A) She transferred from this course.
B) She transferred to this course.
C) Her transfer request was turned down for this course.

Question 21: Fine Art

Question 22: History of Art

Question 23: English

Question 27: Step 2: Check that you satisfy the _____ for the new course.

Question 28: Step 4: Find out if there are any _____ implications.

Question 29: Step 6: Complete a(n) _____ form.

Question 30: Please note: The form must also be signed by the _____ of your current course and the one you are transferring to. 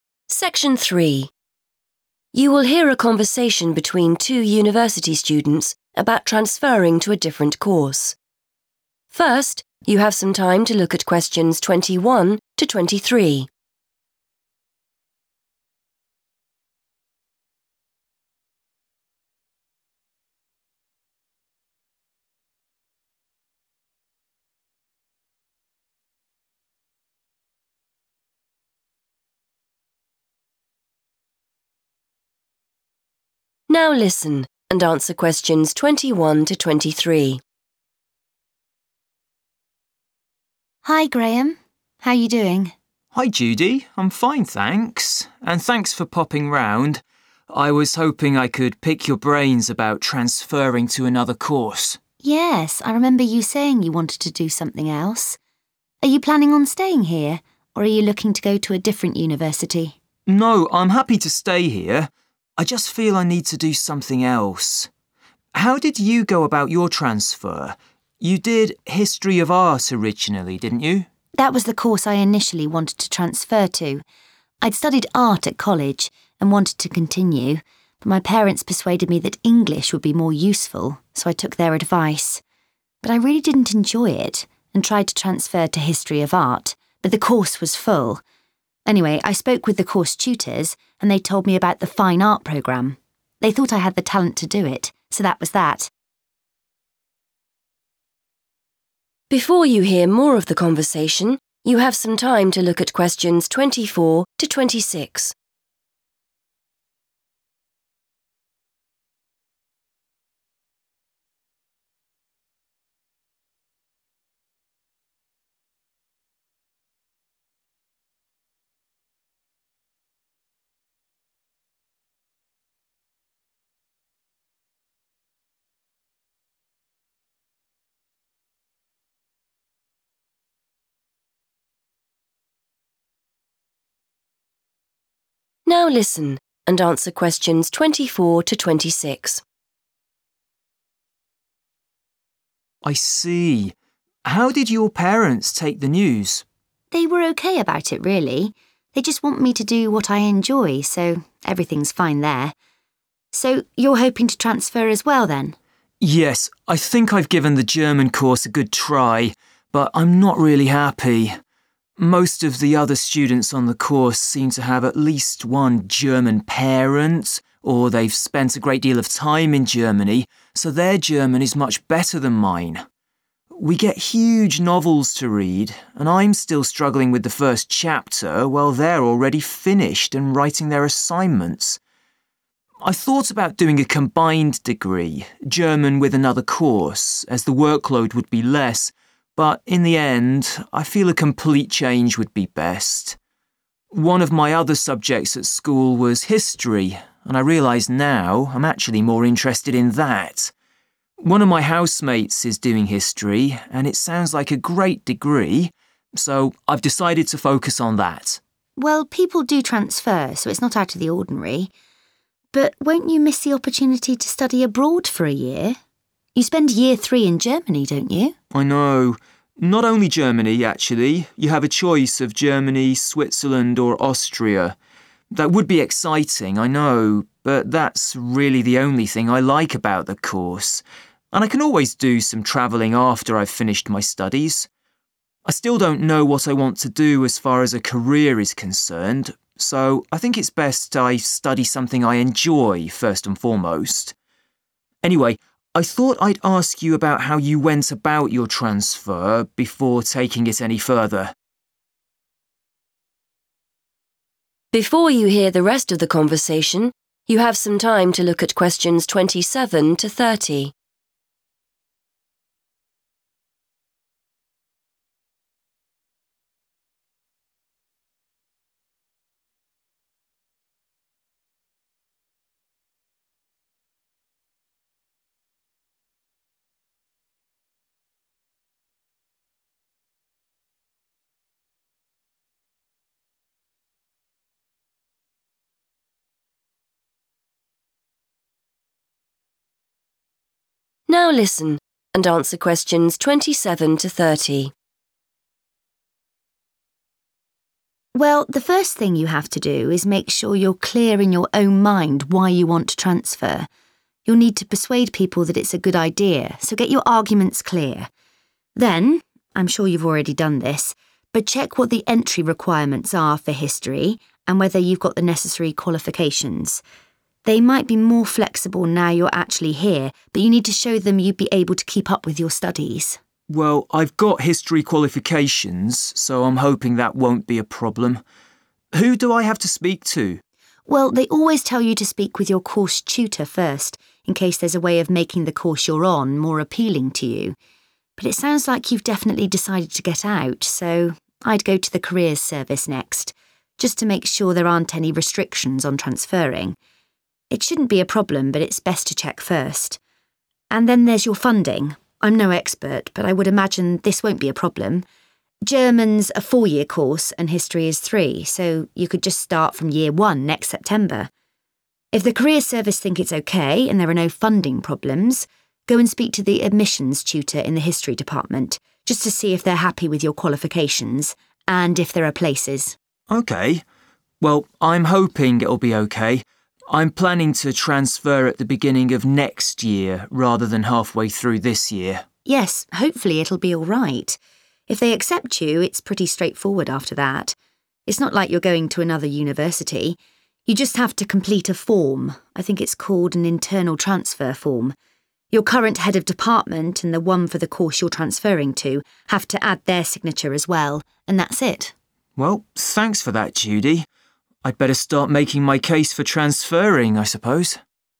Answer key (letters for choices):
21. B
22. C
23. A
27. qualifications / entry requirements
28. funding
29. internal transfer
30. Head of Department

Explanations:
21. The correct answer is B because Judy explains how she changed her course. She first studied English but did not enjoy it. She wanted to study History of Art, but there was no more space. Her teachers then suggested she join the Fine Art course because she was good at it. She followed their advice and moved into that course. The words 'transfer to' mean to change from one thing to another.
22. The correct answer is C because Judy explains that she tried to switch her studies to History of Art. However, she says that 'the course was full', which means the university could not accept her request to join that specific class. In English, when a request is rejected or cannot be granted, we say it was 'turned down'.
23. The correct answer is A because Judy says she followed her parents' advice to study English even though she wanted to continue studying art. However, since she did not like the English course, she looked for a different subject and eventually moved to the Fine Art programme. This process of changing your course within a university is called a 'transfer'. Because English was her original course that she left, she transferred 'from' it.
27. The correct answer is drawn from Judy's advice on how to change courses. She tells Graham that he must look at the entry requirements (the rules for joining) and check if he has the right qualifications (his background grades) to show the new department that he is ready for the work.
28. The correct answer is 'funding' because Judy advises Graham to check his financial situation as the fourth step in his transfer process. She mentions this after the step involving the Careers Service and before the step involving the Admissions Tutor. In the task, the phrase 'funding implications' refers to what Judy describes as potential 'funding problems' regarding his transition from a four-year course to a three-year one.
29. The correct answer is found when Judy talks about how easy it is to change courses once you are accepted. She says that since the student is staying at the same university, they only need to fill out a paper called an 'internal transfer form'. Keywords like 'complete a form' and 'called an...' show that this is the specific name of the document needed.
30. The correct answer is determined by Judy's explanation of the final steps in the transfer process. She mentions that after getting a form, it needs to be signed by the leader of the student's current subject area and the leader of the new subject area. In the transcript, she uses the specific title "Head of Department" to describe these individuals.

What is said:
Judy: Hi Graham. How you doing?
Graham: Hi Judy. I'm fine, thanks. And thanks for popping round. I was hoping I could pick your brains about transferring to another course.
Judy: Yes, I remember you saying you wanted to do something else. Are you planning on staying here, or are you looking to go to a different university?
Graham: No, I'm happy to stay here. I just feel I need to do something else. How did you go about your transfer? You did History of Art originally, didn't you?
Judy: That was the course I initially wanted to transfer to. I'd studied Art at college and wanted to continue but my parents persuaded me that English would be more useful, so I took their advice. But I really didn't enjoy it and tried to transfer to History of Art but the course was full. Anyway, I spoke with the course tutors and they told me about the Fine Art programme. They thought I had the talent to do it, so that was that.
Graham: I see. How did your parents take the news?
Judy: They were OK about it, really. They just want me to do what I enjoy, so everything's fine there. So, you're hoping to transfer as well, then?
Graham: Yes, I think I've given the German course a good try but I'm not really happy. Most of the other students on the course seem to have at least one German parent or they've spent a great deal of time in Germany, so their German is much better than mine. We get huge novels to read and I'm still struggling with the first chapter while they're already finished and writing their assignments. I thought about doing a combined degree, German with another course, as the workload would be less but in the end I feel a complete change would be best. One of my other subjects at school was History and I realise now I'm actually more interested in that. One of my housemates is doing History and it sounds like a great degree, so I've decided to focus on that.
Judy: Well, people do transfer, so it's not out of the ordinary. But won't you miss the opportunity to study abroad for a year? You spend Year 3 in Germany, don't you?
Graham: I know. Not only Germany, actually. You have a choice of Germany, Switzerland or Austria. That would be exciting, I know, but that's really the only thing I like about the course and I can always do some travelling after I've finished my studies. I still don't know what I want to do as far as a career is concerned, so I think it's best I study something I enjoy, first and foremost. Anyway, I thought I'd ask you about how you went about your transfer before taking it any further.
Judy: Well, the first thing you have to do is make sure you're clear in your own mind why you want to transfer. You'll need to persuade people that it's a good idea, so get your arguments clear. Then ... I'm sure you've already done this, but check what the entry requirements are for History and whether you've got the necessary qualifications. They might be more flexible now you're actually here but you need to show them you'd be able to keep up with your studies.
Graham: Well I've got History qualifications, so I'm hoping that won't be a problem. Who do I have to speak to?
Judy: Well, they always tell you to speak with your course tutor first in case there's a way of making the course you're on more appealing to you. But it sounds like you've definitely decided to get out, so I'd go to the Careers Service next, just to make sure there aren't any restrictions on transferring. It shouldn't be a problem but it's best to check first. And then there's your funding. I'm no expert but I would imagine this won't be a problem; German's a four-year course and History is three, so you could just start from Year 1 next September. If the Careers Service think it's OK and there are no funding problems, go and speak to the Admissions Tutor in the History Department, just to see if they're happy with your qualifications - and if there are places.
Well, I'm hoping it'll be OK. I'm planning to transfer at the beginning of next year rather than half-way through this year.
Judy: Yes, hopefully it'll be alright. If they accept you, it's pretty straightforward after that. It's not like you're going to another university. You just have to complete a form - I think it's called an internal transfer form. Your current Head of Department and the one for the course you're transferring to have to add their signature as well. And that's it.
Graham: Well, thanks for that, Judy. I'd better start making my case for transferring, I suppose.